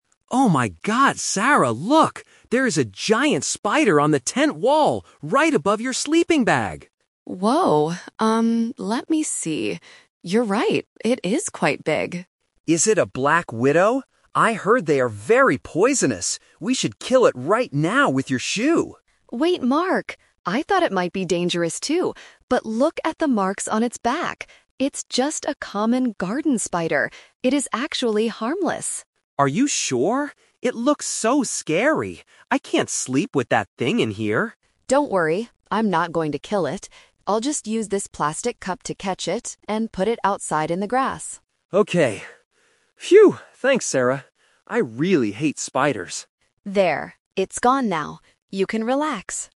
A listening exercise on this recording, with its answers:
Listen to the conversation between two campers and choose the correct answer (A, B, or C).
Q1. Where is the spider located?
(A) Under the sleeping bag.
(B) On the tent wall.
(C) In Sarah's shoe.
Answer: On the tent wall.

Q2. What was Mark's first reaction?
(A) He wanted to catch it with a cup.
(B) He wanted to take a photo of it.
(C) He wanted to kill it with a shoe.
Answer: He wanted to kill it with a shoe.

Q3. What is the truth about the spider?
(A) It is a very poisonous Black Widow.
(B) It is a harmless garden spider.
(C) It is a dangerous forest insect.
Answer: It is a harmless garden spider.

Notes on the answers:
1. Mark says, "There is a giant spider on the tent wall." Option (A) is the trap because he mentions it's above the sleeping bag. Option (C) is the trap because he mentions a "shoe" later.
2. Mark says, "We should kill it right now with your shoe!" Option (A) is the trap; this is what Sarah actually does at the end, not what Mark wanted at first.
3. Sarah corrects Mark, saying "It's just a common garden spider. It is actually harmless." Option (A) is the trap; Mark thought it was a Black Widow, but he was wrong (The Twist).

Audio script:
Mark: Oh my god, Sarah! Look! There is a giant spider on the tent wall, right above your sleeping bag!
Sarah: Whoa! Um, let me see... You're right, it is quite big.
Mark: Is it a Black Widow? I heard they are very poisonous. We should kill it right now with your shoe!
Sarah: Wait, Mark! I thought it might be dangerous too, but look at the marks on its back. It's just a common garden spider. It is actually harmless.
Mark: Are you sure? It looks so scary. I can't sleep with that thing in here.
Sarah: Don't worry. I'm not going to kill it. I'll just use this plastic cup to catch it and put it outside in the grass.

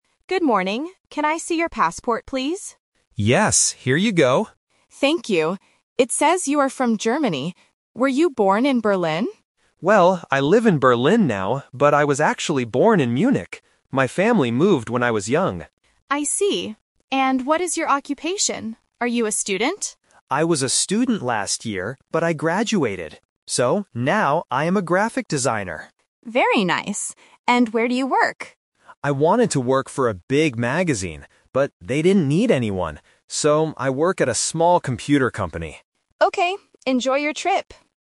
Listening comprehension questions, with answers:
Listen to a conversation between a customs officer and a tourist at the airport. For each question, choose the correct answer (A, B, or C).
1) Where was the tourist born?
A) In Berlin.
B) In Munich.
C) In Frankfurt.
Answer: In Munich.

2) What is the tourist's current job?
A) A student.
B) A graphic designer.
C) A photographer.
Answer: A graphic designer.

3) Where does the tourist work?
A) At a big magazine.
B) At a small computer company.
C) At an art school.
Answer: At a small computer company.

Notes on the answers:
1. The tourist clarifies his birthplace by saying, "...but I was actually born in Munich." Why the traps are wrong: Option A is a "Twist Trap". The officer asks if he was born in Berlin, and the tourist says he lives there now, but wasn't born there. Option C is not mentioned.
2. The tourist explains his current occupation: "So, now I am a graphic designer." Why the traps are wrong: Option A is a trap. The officer asks if he is a student, and he confirms he was a student last year, but he has already graduated. Option C is a plausible guess for a creative job, but it is not mentioned in the audio.
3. The tourist states his current workplace: "So, I work at a small computer company." Why the traps are wrong: Option A is the trap. He wanted to work for a big magazine, but they didn't have any open jobs. Option C is not mentioned.

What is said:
Officer: Good morning. Can I see your passport, please?
Tourist: Yes, here you go.
Officer: Thank you. It says you are from Germany. Were you born in Berlin?
Tourist: Well, I live in Berlin now, but I was actually born in Munich. My family moved when I was young.
Officer: I see. And what is your occupation? Are you a student?
Tourist: I was a student last year, but I graduated. So, now I am a graphic designer.
Officer: Very nice. And where do you work?
Tourist: I wanted to work for a big magazine, but they didn't need anyone. So, I work at a small computer company.
Officer: Okay. Enjoy your trip!

